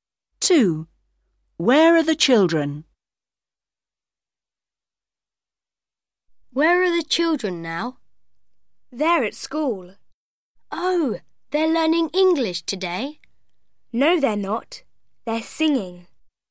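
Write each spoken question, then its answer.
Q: Where are the children?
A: At school, singing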